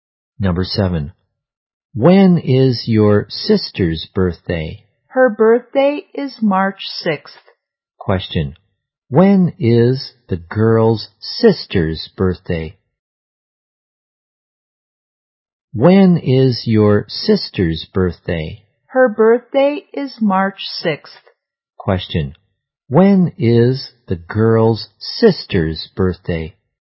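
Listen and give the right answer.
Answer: March 6th.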